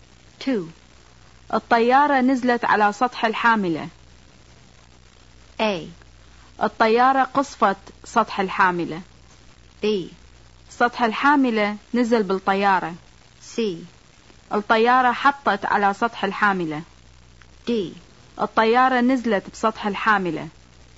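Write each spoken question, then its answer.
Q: الطيارة نزلت على سطح الحاملة.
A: C: الطيارة حطت على سطح الحاملة.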